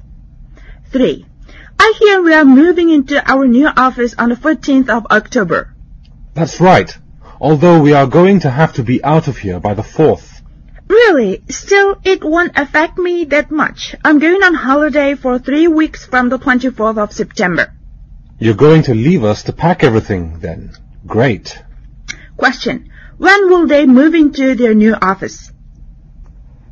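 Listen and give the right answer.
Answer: 14th October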